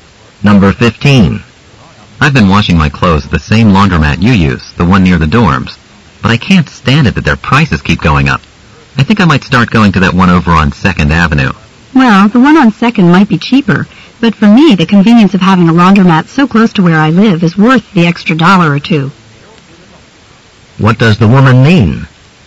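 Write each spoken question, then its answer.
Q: What does the woman mean?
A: She prefers the nearby laundromat even though it costs more.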